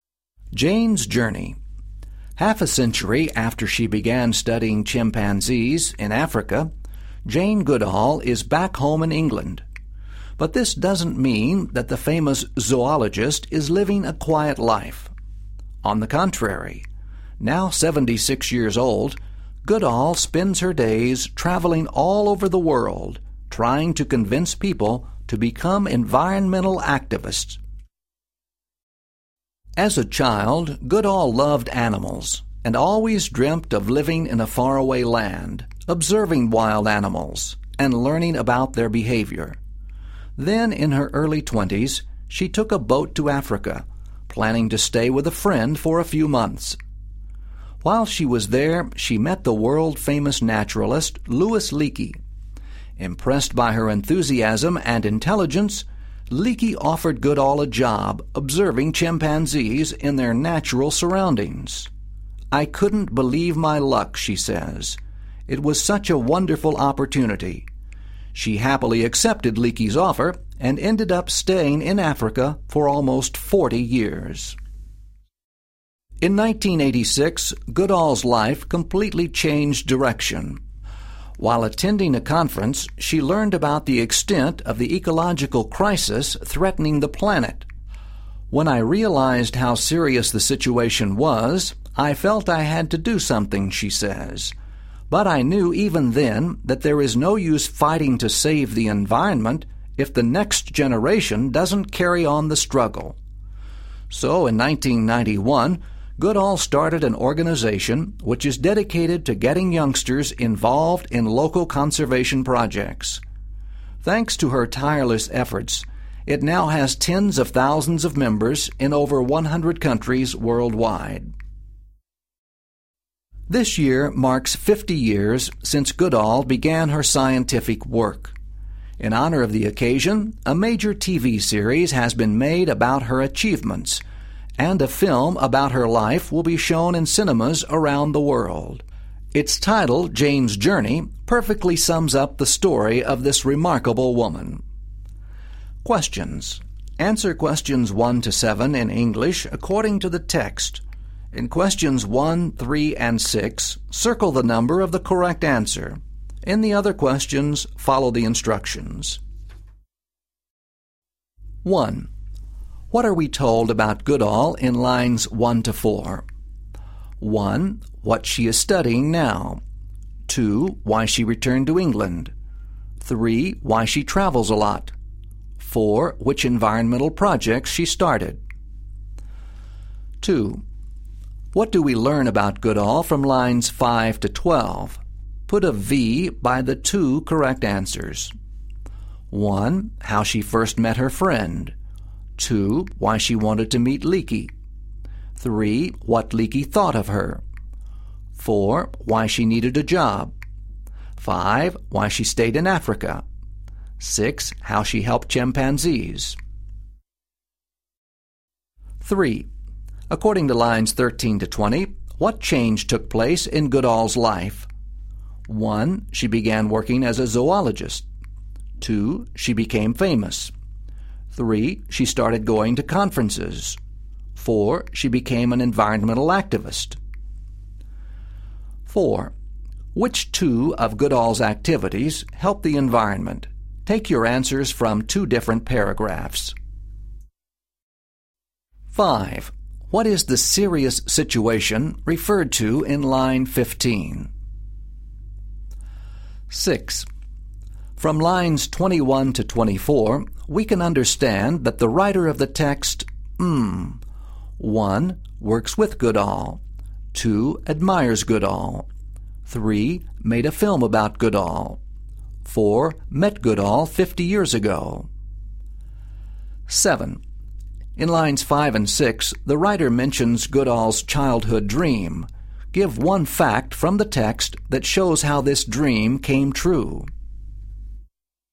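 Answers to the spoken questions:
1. 3: Why she travels a lot.
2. 3: What Leakey thought of her; 5: Why she stayed in Africa.
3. 4: She became an environmental activist.
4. She travels the world convincing people to become environmental activists, and she started an organization that gets youngsters involved in local conservation projects.
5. The ecological crisis threatening the planet.
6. 2: Admires Goodall.
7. She went to Africa and observed chimpanzees in their natural surroundings.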